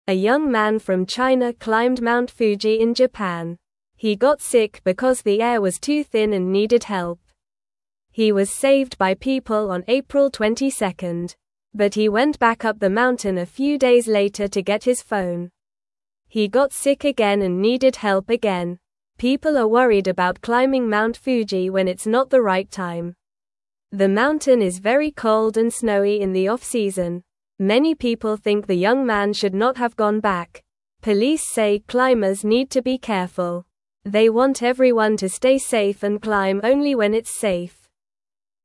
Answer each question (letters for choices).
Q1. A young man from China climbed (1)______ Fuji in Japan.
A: Mount

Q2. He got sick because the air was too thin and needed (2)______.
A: help

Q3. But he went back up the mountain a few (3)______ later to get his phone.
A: days

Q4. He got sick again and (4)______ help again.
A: needed

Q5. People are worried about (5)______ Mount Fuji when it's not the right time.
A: climbing

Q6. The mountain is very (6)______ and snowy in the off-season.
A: cold

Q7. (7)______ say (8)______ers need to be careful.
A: Police

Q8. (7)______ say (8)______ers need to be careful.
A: climb

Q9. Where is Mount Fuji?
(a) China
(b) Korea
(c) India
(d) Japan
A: d

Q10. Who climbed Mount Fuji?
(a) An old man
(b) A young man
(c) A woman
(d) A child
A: b

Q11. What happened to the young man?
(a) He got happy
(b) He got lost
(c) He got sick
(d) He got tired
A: c

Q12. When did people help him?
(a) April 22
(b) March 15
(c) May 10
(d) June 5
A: a

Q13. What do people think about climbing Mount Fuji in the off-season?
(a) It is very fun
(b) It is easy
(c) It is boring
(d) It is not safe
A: d

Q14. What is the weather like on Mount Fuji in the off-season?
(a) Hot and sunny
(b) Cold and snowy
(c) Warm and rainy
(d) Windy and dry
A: b

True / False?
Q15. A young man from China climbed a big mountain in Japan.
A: True

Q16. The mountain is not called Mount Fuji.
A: False

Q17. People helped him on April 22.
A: True

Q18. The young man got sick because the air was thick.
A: False

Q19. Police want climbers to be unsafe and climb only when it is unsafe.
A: False

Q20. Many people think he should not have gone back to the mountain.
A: True

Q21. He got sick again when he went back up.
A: True

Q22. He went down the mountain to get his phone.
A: False

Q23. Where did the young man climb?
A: He climbed Mount Fuji in Japan.

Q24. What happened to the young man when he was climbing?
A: He got sick because the air was too thin.

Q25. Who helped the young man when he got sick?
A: People helped him when he got sick.

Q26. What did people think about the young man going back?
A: People thought he should not have gone back.

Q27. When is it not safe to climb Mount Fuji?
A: It is not safe to climb when it is very cold and snowy.

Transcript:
A young man from China climbed Mount Fuji in Japan. He got sick because the air was too thin and needed help. He was saved by people on April 22. But he went back up the mountain a few days later to get his phone. He got sick again and needed help again.
People are worried about climbing Mount Fuji when it's not the right time. The mountain is very cold and snowy in the off-season. Many people think the young man should not have gone back. Police say climbers need to be careful. They want everyone to stay safe and climb only when itβs safe.